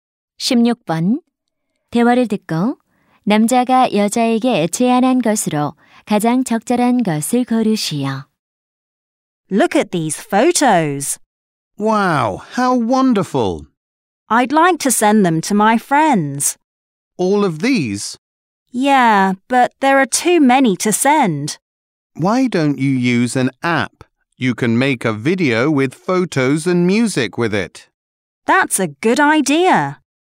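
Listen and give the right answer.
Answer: 앱으로 사진과 음악으로 동영상 만들기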